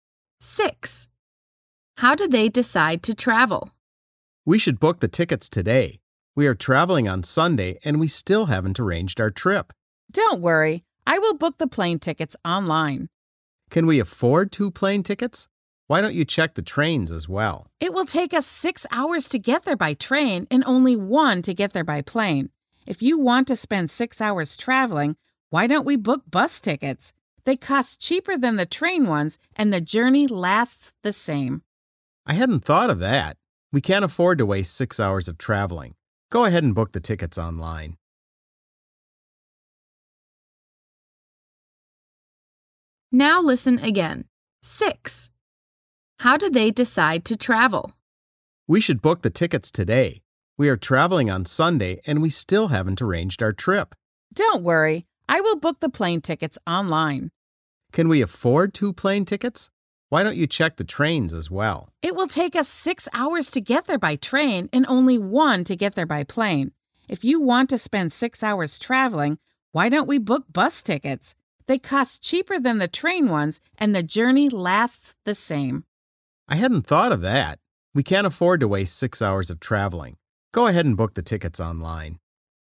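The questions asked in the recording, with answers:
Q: How do they decide to travel?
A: By plane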